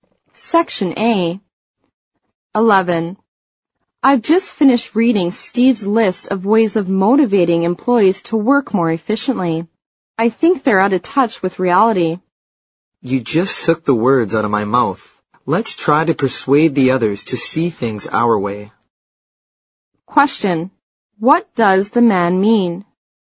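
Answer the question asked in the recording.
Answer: He agrees with the woman that Steve's ideas are unrealistic.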